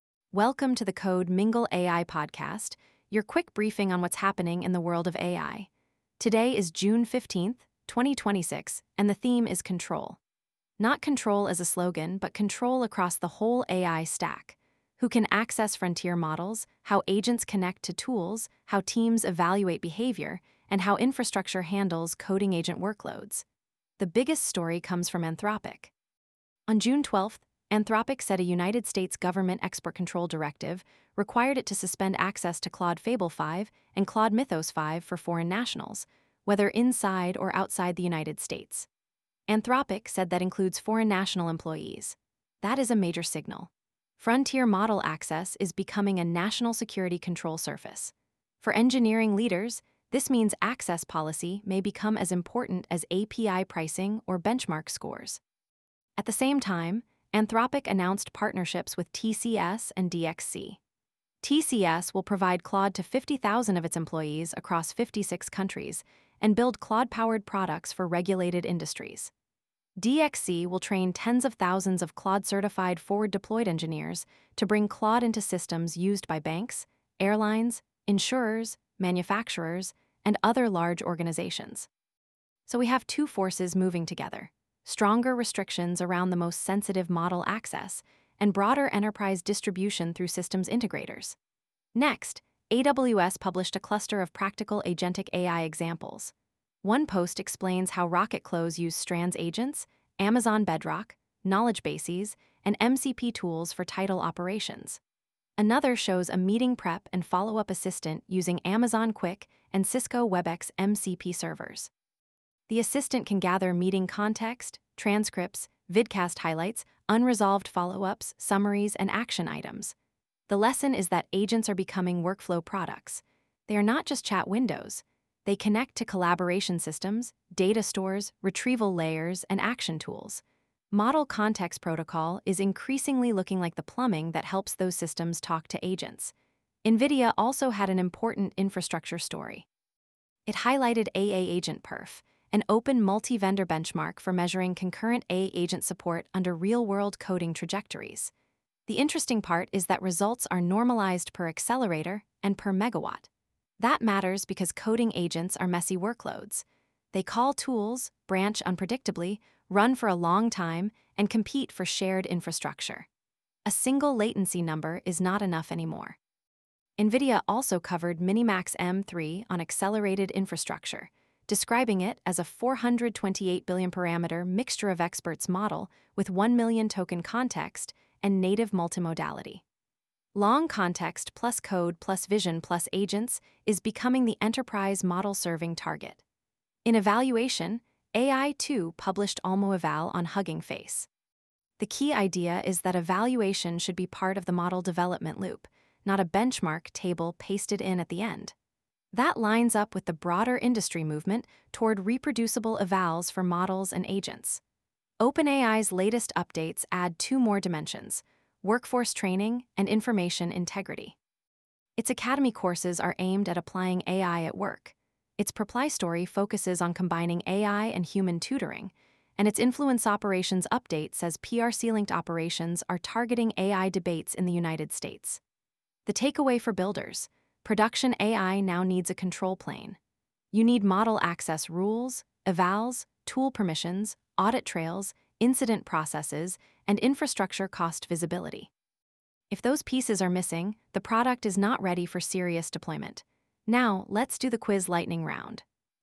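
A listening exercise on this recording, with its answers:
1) What made Anthropic's June 12 Fable 5 and Mythos 5 statement especially significant?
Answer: It said a US government export-control directive forced suspension of access for foreign nationals.

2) Why are Anthropic's TCS and DXC partnerships strategically important?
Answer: They show frontier AI companies using large systems integrators to reach regulated industries.

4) Why is NVIDIA's discussion of AA-AgentPerf relevant to coding-agent infrastructure?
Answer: It focuses on concurrent, tool-heavy coding-agent workloads and normalizes results per accelerator and per megawatt.

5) What is the main lesson from Ai2's olmo-eval and related evaluation tooling?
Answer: Evaluation is becoming part of the model and agent development loop.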